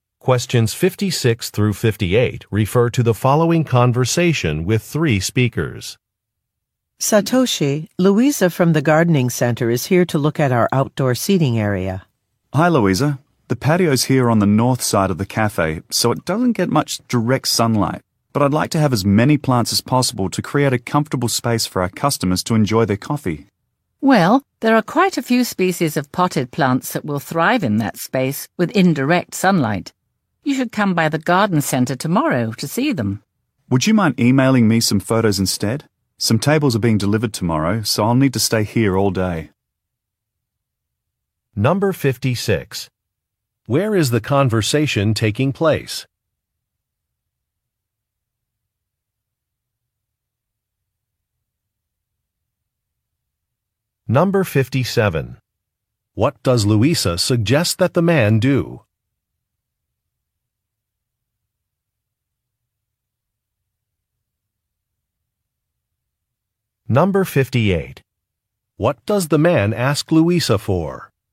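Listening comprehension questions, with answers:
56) Where is the conversation taking place?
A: At a café

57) What does Luisa suggest that the man do?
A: Visit a plant shop

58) What does the man ask Luisa for?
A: Some photographs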